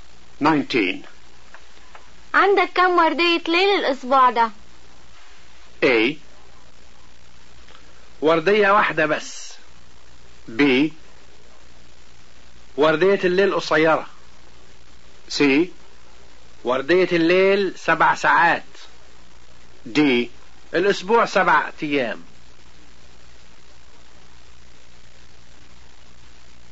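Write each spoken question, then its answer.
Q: عندك كم وردية ليل الأسبوع ده؟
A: A: وردية واحدة بس.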